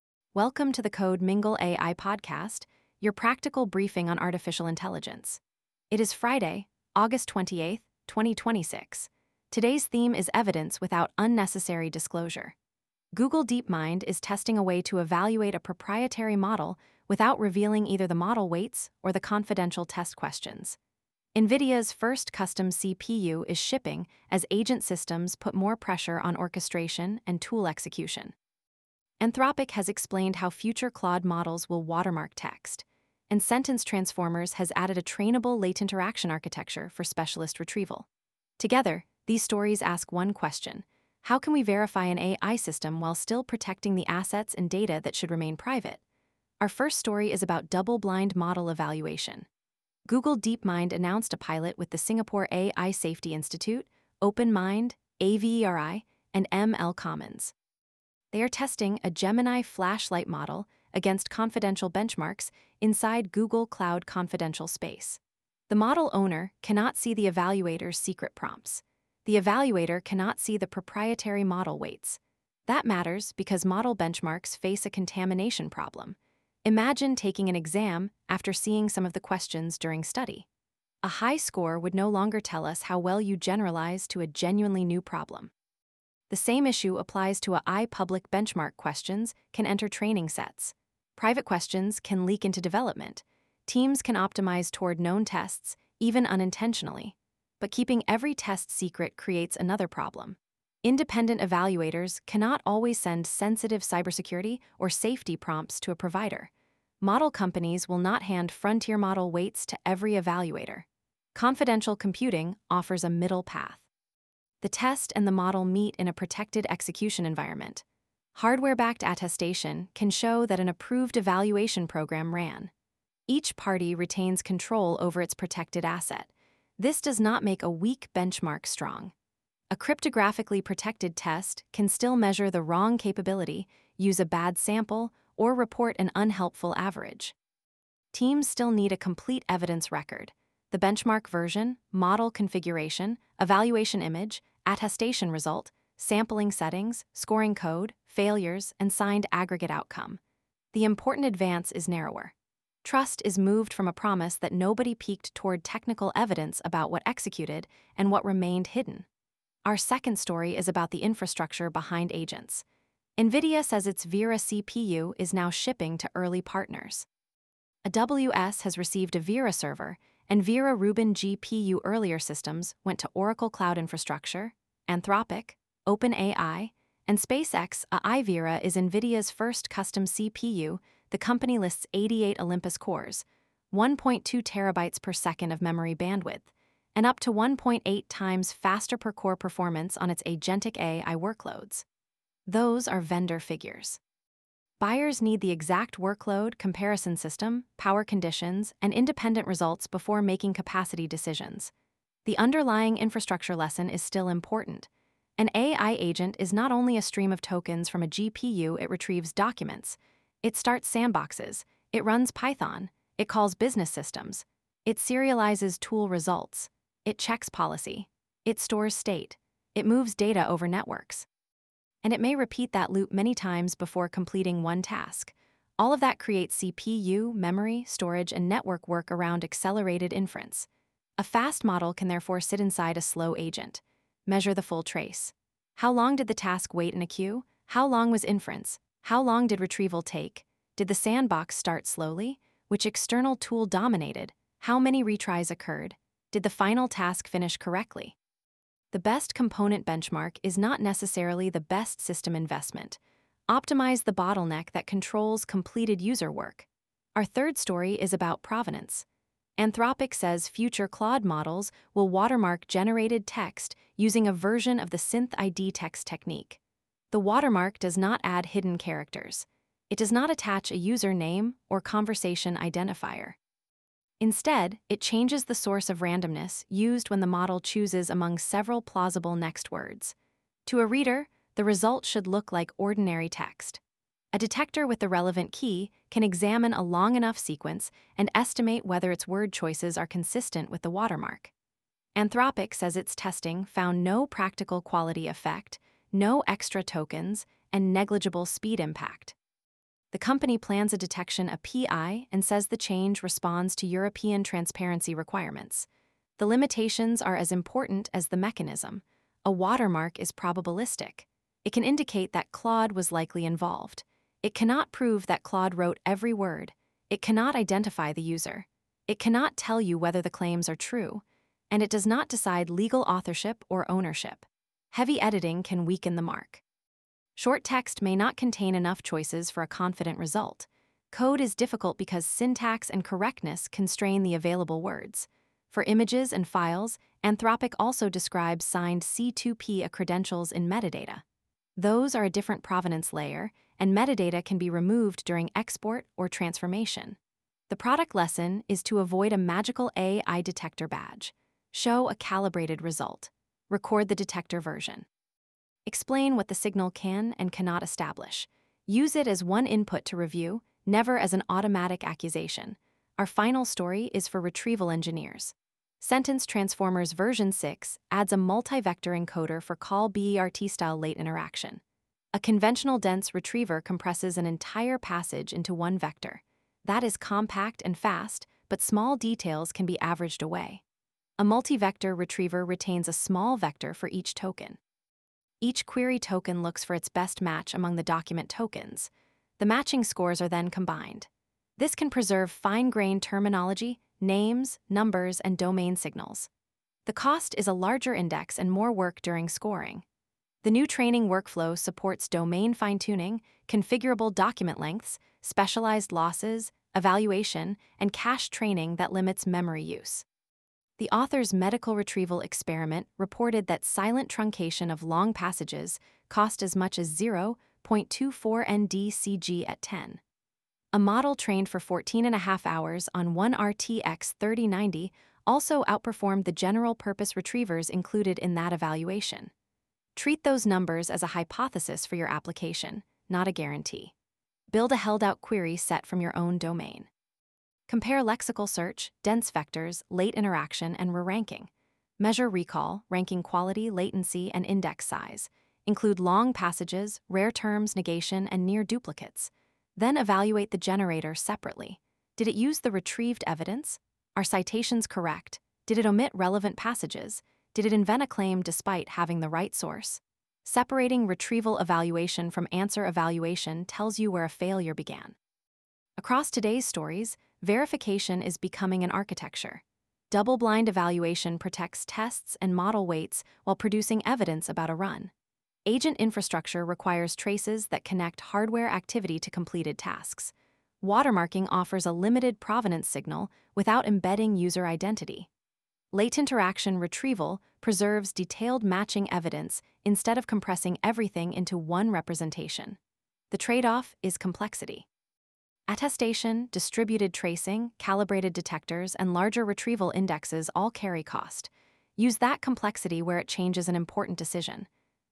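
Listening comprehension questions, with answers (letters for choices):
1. What does Google DeepMind's double-blind evaluation design keep separate?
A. The evaluator's confidential prompts and the provider's proprietary model weights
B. The CPU and system memory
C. The user interface and its stylesheet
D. Training data and electricity usage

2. Why can an agent workload remain slow even when model inference is fast?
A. Agents never use accelerators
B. Tool execution, retrieval, sandboxing, orchestration, and I/O add end-to-end latency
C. Every tool call retrains the model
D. CPU work is forbidden in agent systems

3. What can Claude's planned text watermark indicate?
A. That every claim in the text is true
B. The legal owner of the text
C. The likelihood that Claude was involved in generating or processing the text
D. The identity of the user who requested it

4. How does a multi-vector late-interaction retriever differ from a conventional dense retriever?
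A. It stores no representation of documents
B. It retains token-level vectors instead of compressing the whole passage into one vector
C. It can only perform exact keyword matching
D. It eliminates the need for evaluation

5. What is the best primary measure when comparing infrastructure for AI agents?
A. Peak component throughput alone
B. The number of product announcements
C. Correctly completed representative tasks, including latency and cost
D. The largest available model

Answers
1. A
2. B
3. C
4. B
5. C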